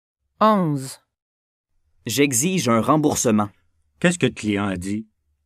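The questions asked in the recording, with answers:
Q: Qu'est-ce que le client a dit?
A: Le client a dit qu'il exigeait un remboursement.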